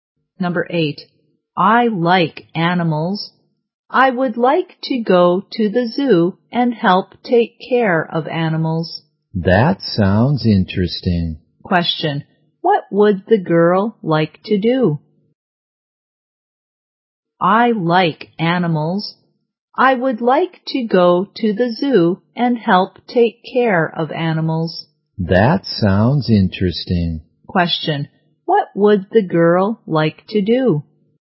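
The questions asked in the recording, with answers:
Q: What would the girl like to do?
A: Go to the zoo and help take care of animals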